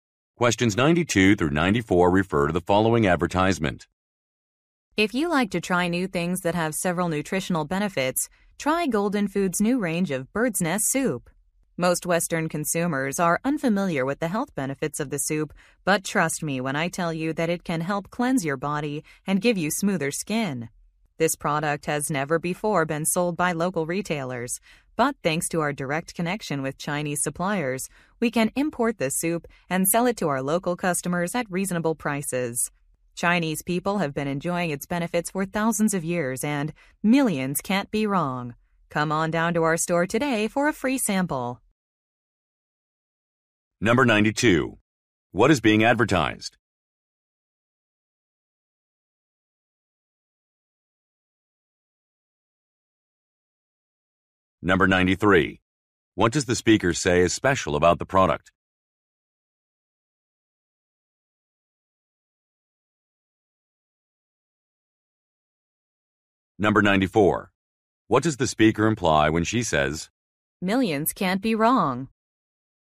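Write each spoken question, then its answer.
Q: What is being advertised?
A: Bird's Nest Soup

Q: What does the speaker say is special about the product?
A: It has never been sold locally before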